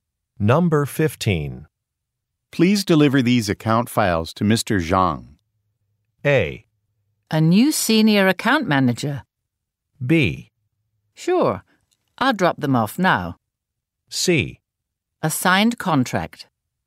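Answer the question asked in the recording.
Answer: B: Sure. I'll drop them off now.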